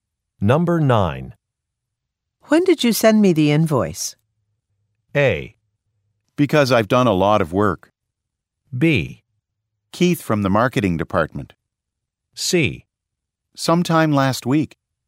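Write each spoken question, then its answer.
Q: When did you send me the invoice?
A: C: Sometime last week.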